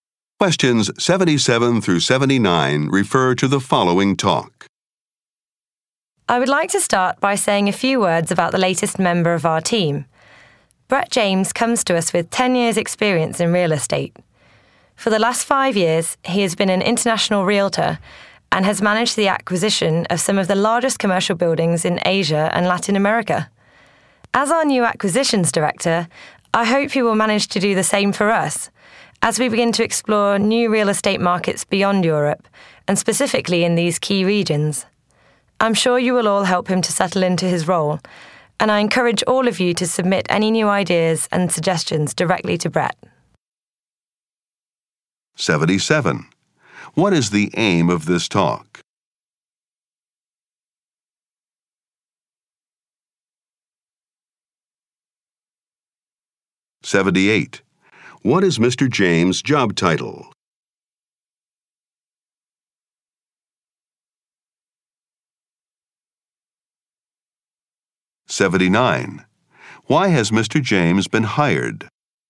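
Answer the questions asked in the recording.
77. To introduce a new team member
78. Acquisitions director
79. To help explore new real estate markets in Asia and Latin America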